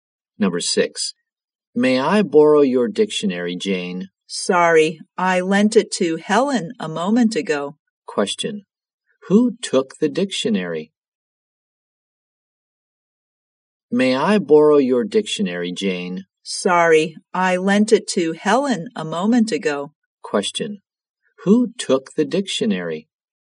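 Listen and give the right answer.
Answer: Helen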